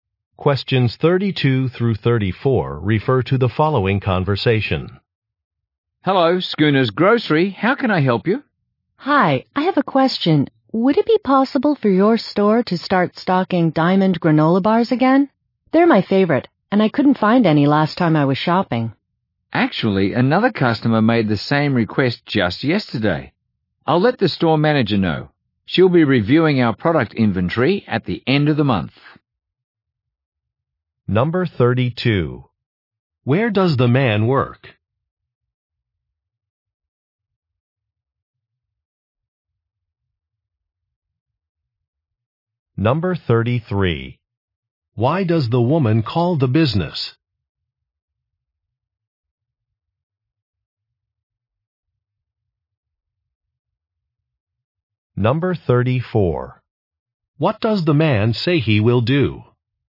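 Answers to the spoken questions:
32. At a grocery store (Schooner's Grocery)
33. To ask the store to stock Diamond granola bars again
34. Tell the store manager about the request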